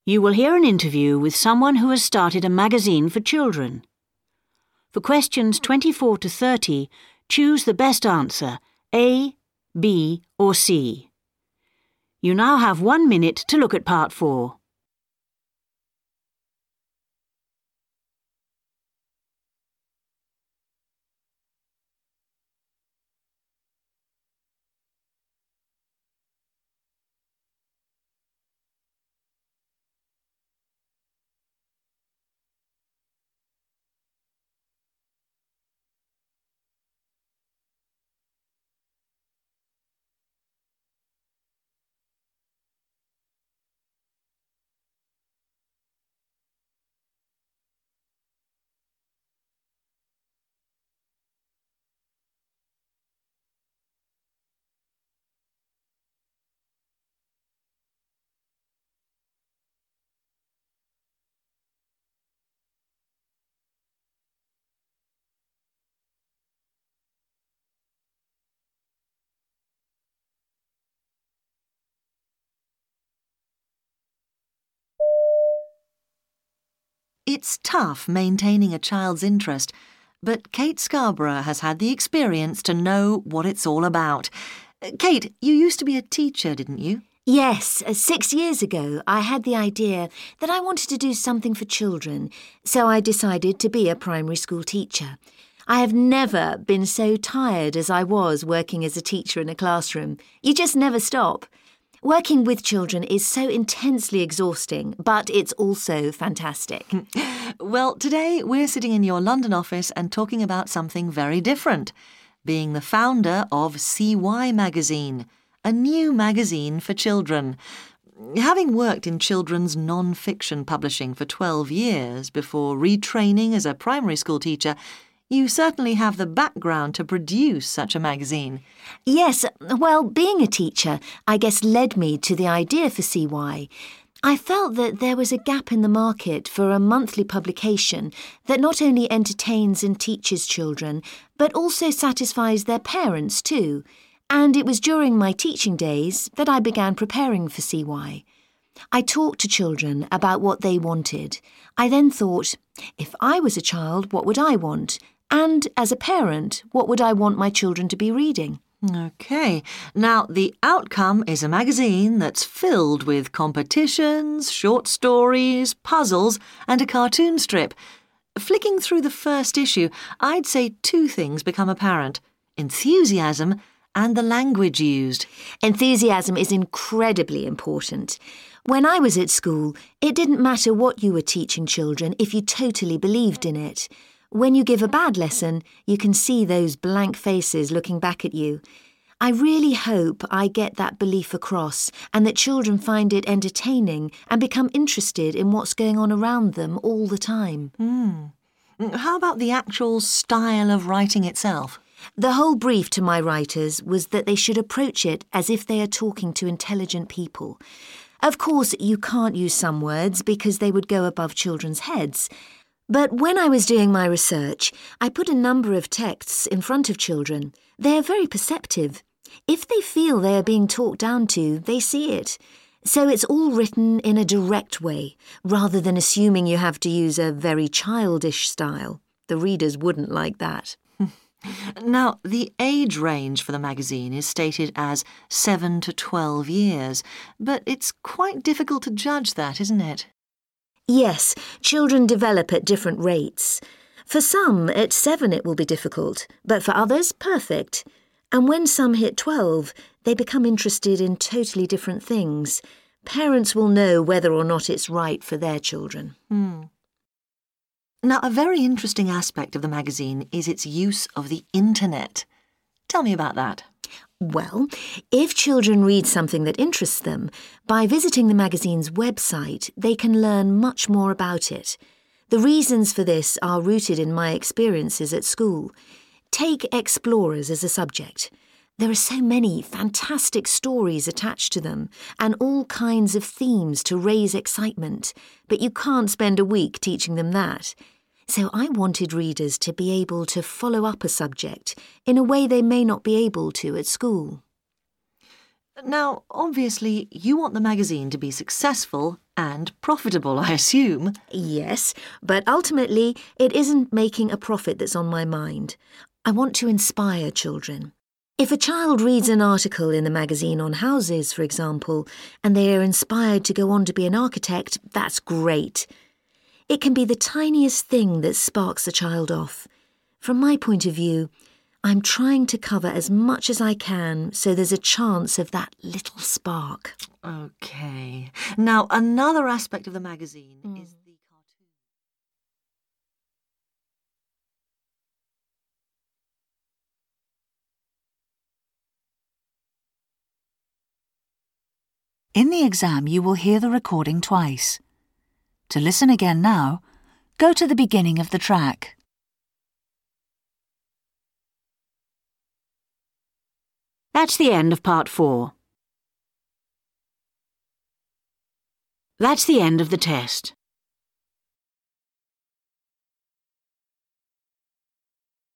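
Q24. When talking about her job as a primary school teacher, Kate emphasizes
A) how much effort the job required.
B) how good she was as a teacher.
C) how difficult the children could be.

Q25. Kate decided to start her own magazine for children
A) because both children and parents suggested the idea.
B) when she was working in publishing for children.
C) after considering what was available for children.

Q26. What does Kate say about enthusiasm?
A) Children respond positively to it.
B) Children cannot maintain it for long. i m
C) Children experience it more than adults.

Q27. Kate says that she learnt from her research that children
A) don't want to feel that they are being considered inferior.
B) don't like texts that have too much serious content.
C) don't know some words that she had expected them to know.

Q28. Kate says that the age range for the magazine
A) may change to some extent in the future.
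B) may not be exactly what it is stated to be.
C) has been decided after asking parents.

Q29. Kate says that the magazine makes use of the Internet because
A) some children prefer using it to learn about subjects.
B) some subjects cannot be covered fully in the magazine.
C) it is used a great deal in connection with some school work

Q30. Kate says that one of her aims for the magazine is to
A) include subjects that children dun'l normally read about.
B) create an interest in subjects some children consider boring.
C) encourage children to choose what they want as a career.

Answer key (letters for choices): 24A, 25C, 26A, 27A, 28B, 29B, 30C

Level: FCE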